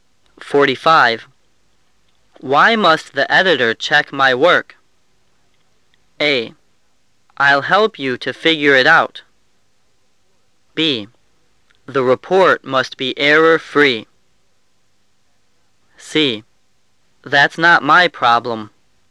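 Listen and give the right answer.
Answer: B: The report must be error-free.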